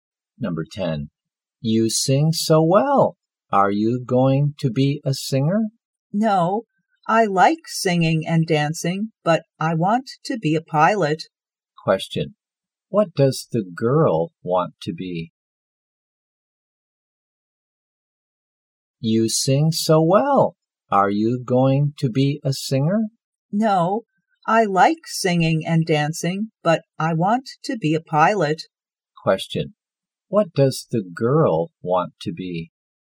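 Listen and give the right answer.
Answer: A pilot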